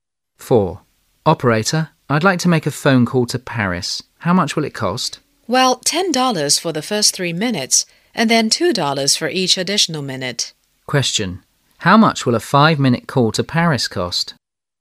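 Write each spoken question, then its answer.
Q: How much will a 5-minute call to Paris cost?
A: $14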